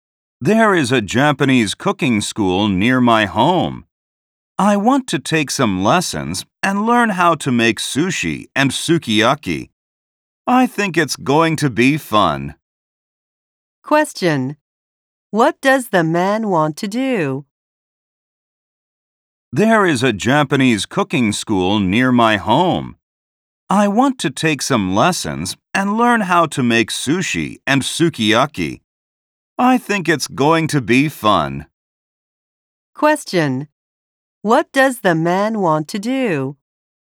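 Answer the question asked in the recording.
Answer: Take Japanese cooking lessons (learn to make sushi and sukiyaki)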